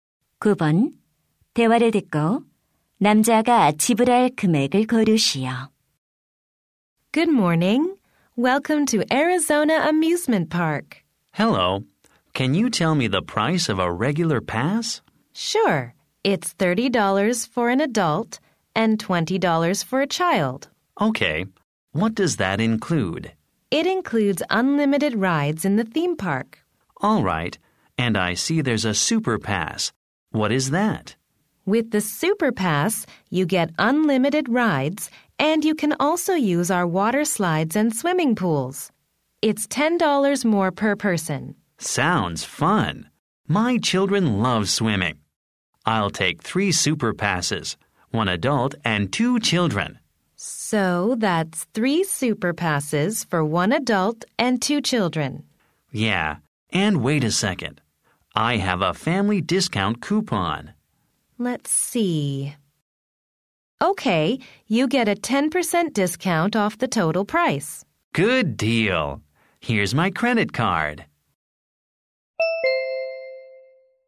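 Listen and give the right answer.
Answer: 90달러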